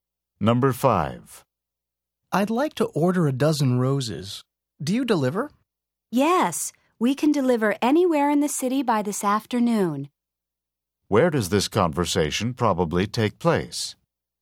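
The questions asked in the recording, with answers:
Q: Where does this conversation probably take place?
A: At a flower shop.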